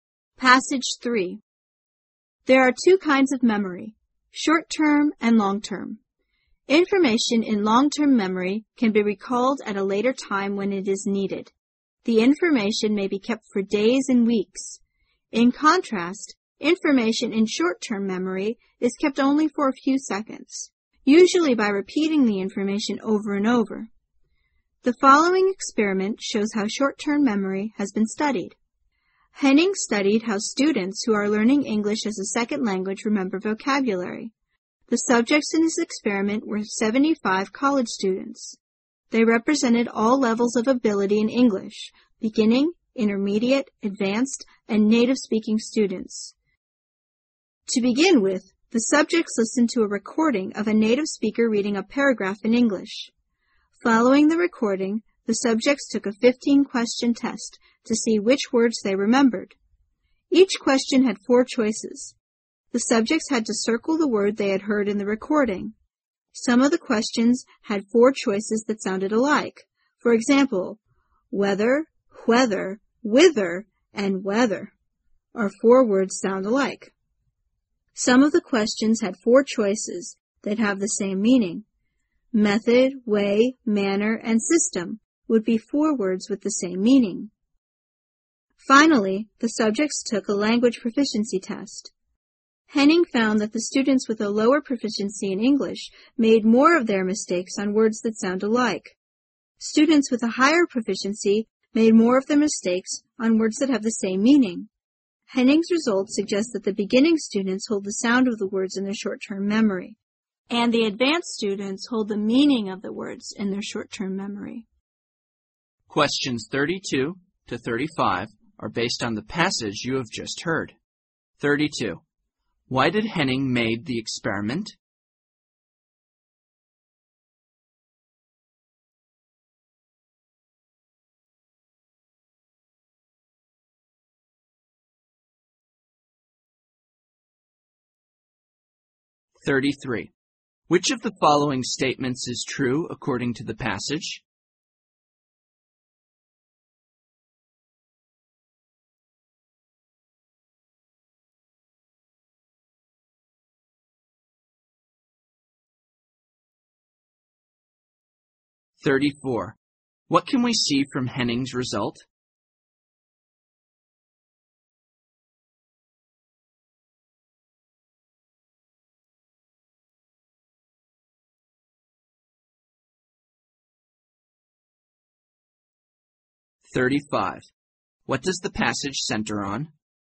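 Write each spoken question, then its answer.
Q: Why did Henning made the experiment?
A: To study how ESL students remember vocabulary in short-term memory.

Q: What can we see from Henning's result?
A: Beginners hold the sound of words in short-term memory; advanced students hold the meaning.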